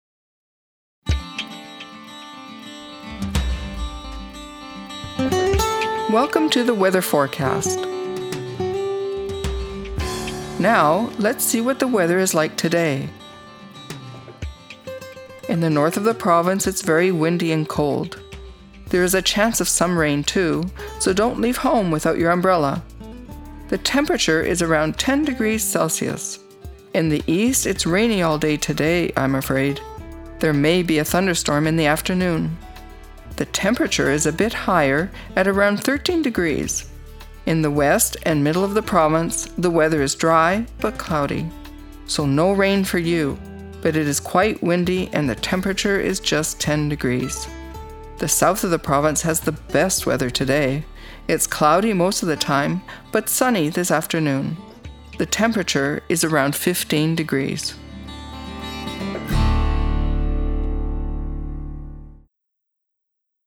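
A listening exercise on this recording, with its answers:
Now, listen to the recording and answer the questions below.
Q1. This weather forecast is for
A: today

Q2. Which part of the province will receive the most rain?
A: the east

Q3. What are the minimum and maximum temperatures for the province?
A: Between 10 and 15 degrees Celsius

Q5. What does the meteorologist recommend?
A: Take an umbrella when leaving home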